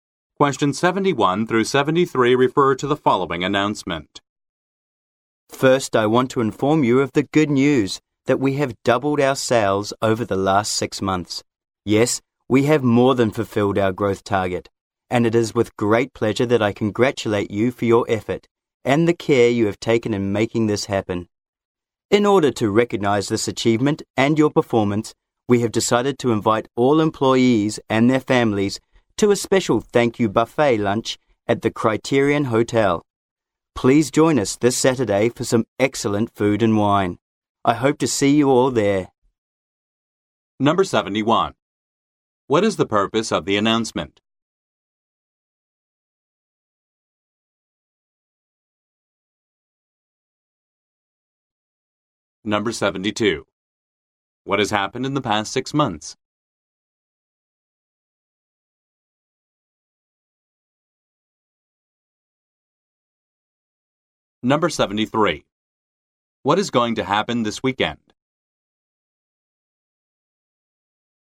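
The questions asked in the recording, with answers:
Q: What has happened in the past 6 months?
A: Sales doubled

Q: What is going to happen this weekend?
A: A thank-you buffet lunch at the Criterion Hotel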